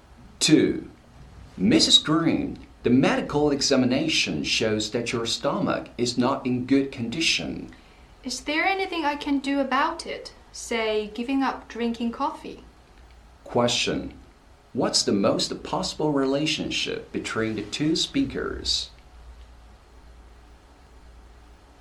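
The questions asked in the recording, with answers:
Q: Question. What's the most possible relationship between the two speakers?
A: Doctor and patient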